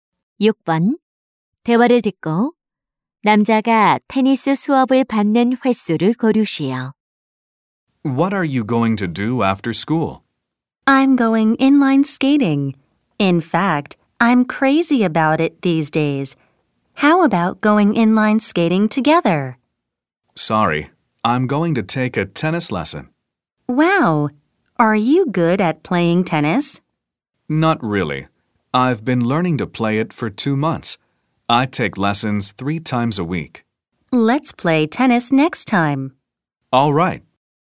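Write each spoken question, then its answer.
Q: 대화를 듣고 남자가 테니스 수업을 받는 횟수를 고르시오.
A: 일주일에 세 번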